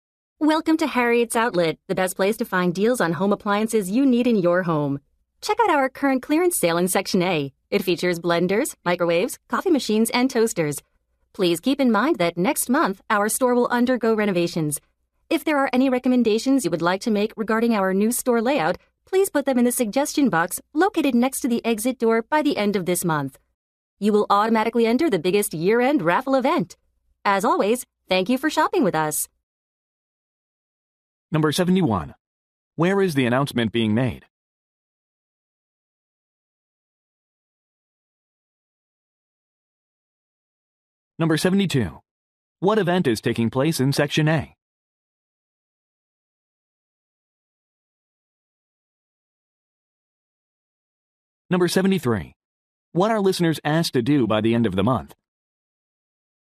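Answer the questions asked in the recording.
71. At a home appliance store (Harriet's Outlet)
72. A clearance sale
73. Put store layout suggestions in the suggestion box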